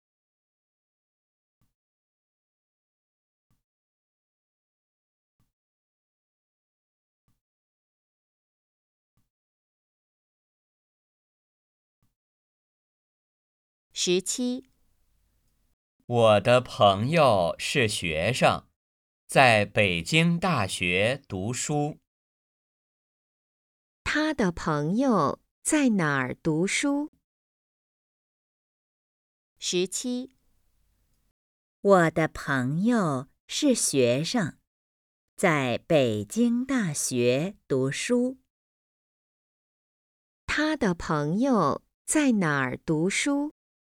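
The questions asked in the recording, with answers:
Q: 他的朋友在哪儿读书?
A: 北京大学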